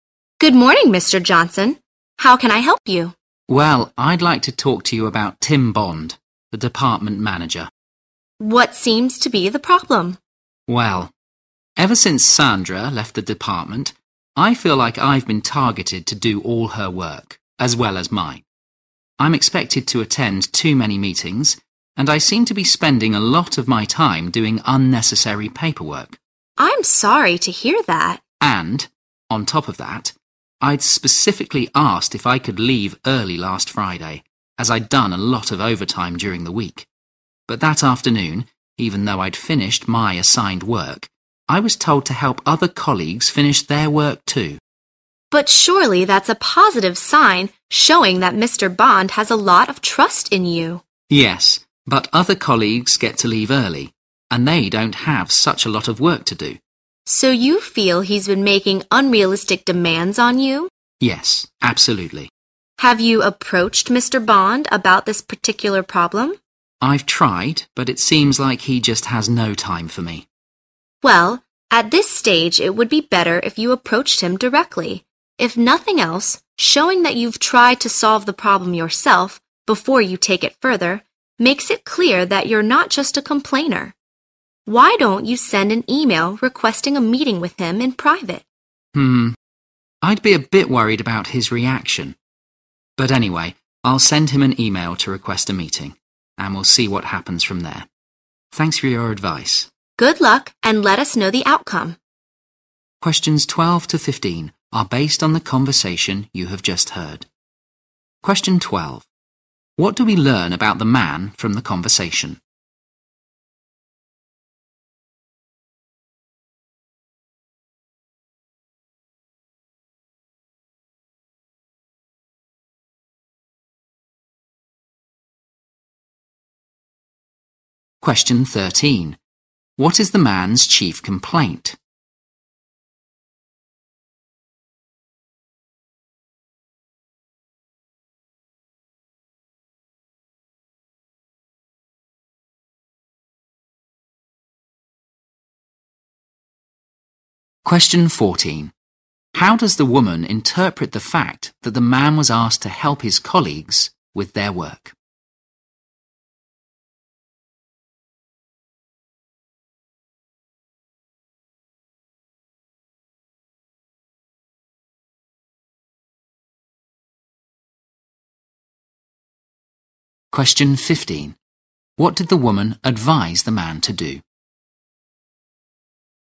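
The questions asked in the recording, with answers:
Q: How does the woman interpret the fact that the man was asked to help his colleagues with their work?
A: It shows Mr. Bond has a lot of trust in him.

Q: What did the woman advise the man to do?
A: Approach Mr. Bond directly and send an email asking for a private meeting.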